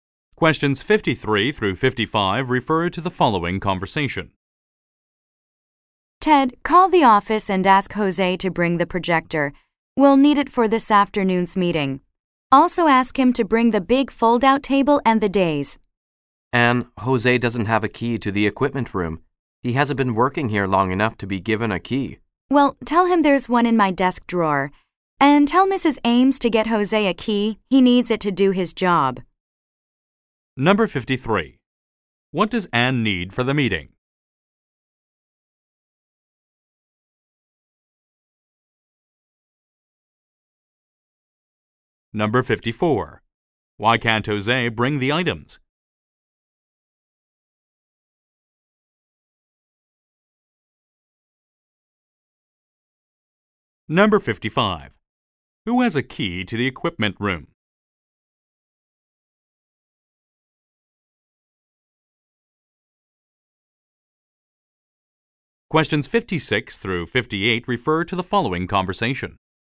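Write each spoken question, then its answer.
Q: What does Anne need for the meeting?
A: The projector, the big fold-out table and the dais

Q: Why can't Jose bring the items?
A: He doesn't have a key to the equipment room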